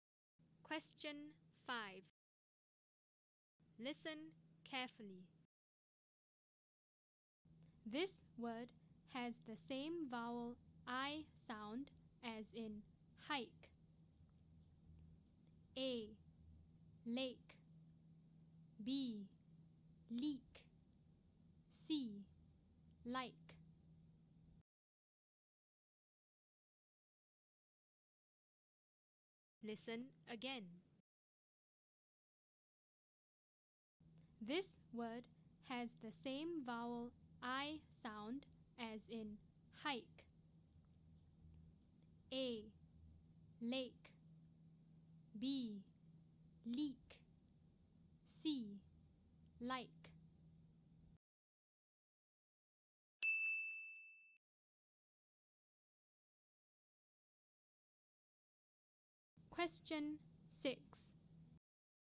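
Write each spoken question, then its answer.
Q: This word has the same vowel I sound as in hike.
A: C: Like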